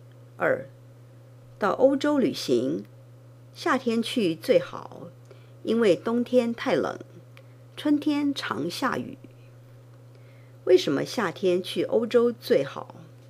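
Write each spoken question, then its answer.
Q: 为什么夏天去欧洲最好?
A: 因为冬天太冷,春天常下雨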